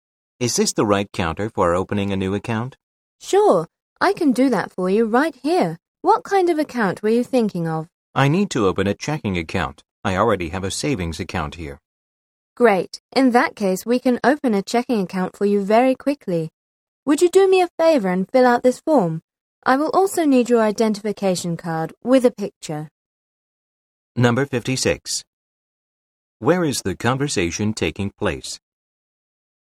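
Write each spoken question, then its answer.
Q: Where is the conversation taking place?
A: At a bank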